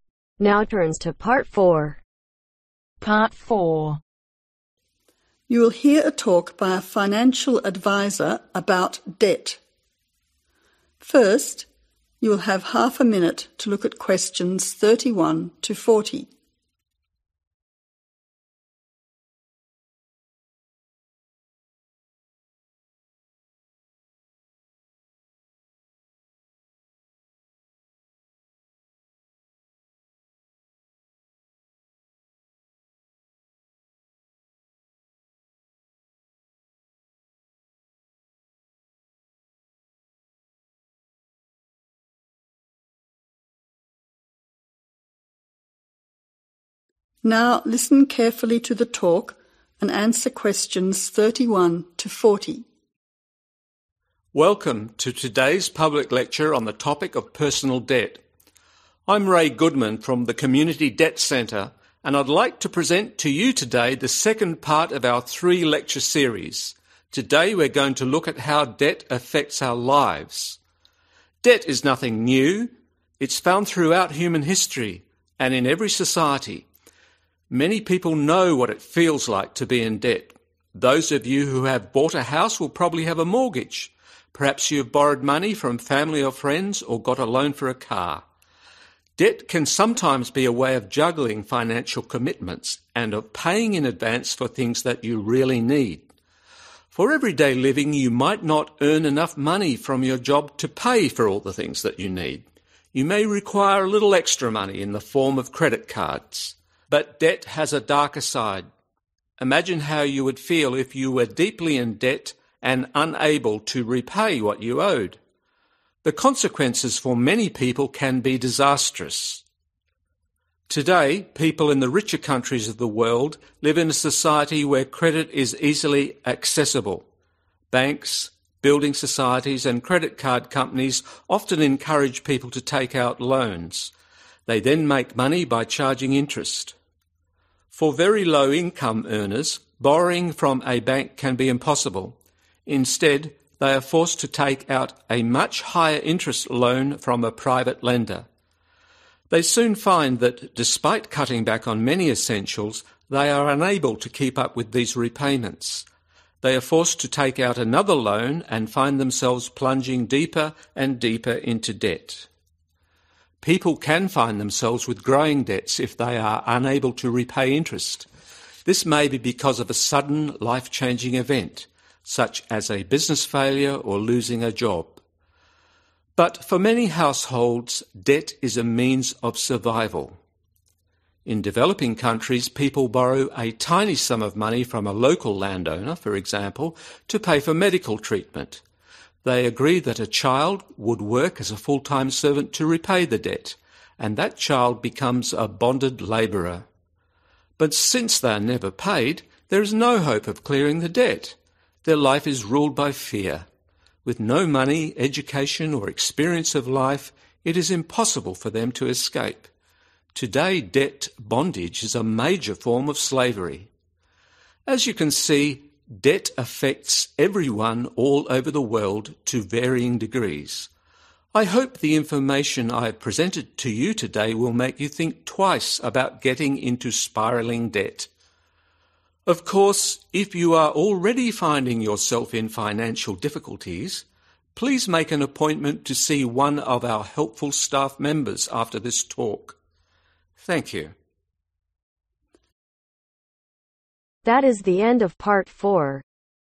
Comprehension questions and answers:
Complete the notes below. Write NO MORE THAN TWO WORDS for each answer.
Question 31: to buy a house you need a ............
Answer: mortgage

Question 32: to buy a car you need to get a ............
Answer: loan

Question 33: to buy everyday items you need a ............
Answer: credit card/ extra money

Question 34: People in developed countries have ............ to credit.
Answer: easy access

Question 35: For poor people, they must use a private lender for a higher interest ............ .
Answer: loan

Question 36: People have increasing debts when they cannot ............ .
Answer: repay interest

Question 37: Something unplanned, for example, a failed business or losing a ............ .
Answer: job